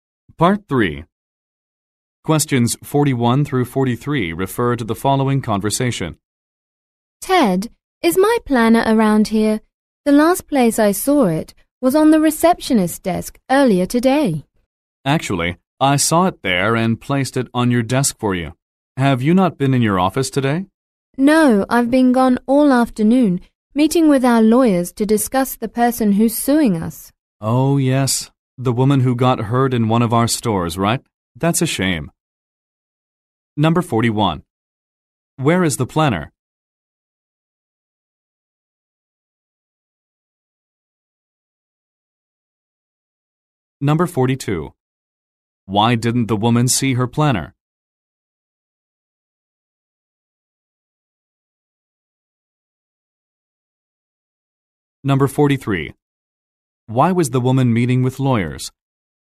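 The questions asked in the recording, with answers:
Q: Where is the planner?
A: On the woman's desk in her office

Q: Why didn't the woman see her planner?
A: She hasn't been in her office today

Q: Why was the woman meeting with lawyers?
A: To discuss a lawsuit by a woman hurt in one of their stores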